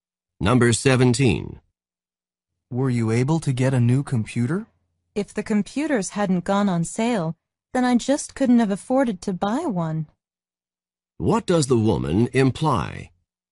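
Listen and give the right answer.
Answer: She bought one because they were on sale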